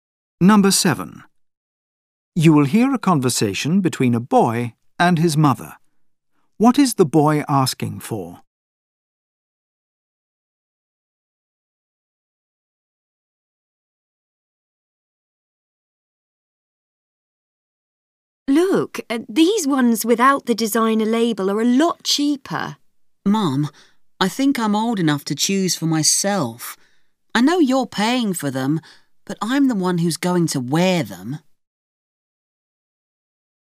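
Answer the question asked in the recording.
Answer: To choose his own clothes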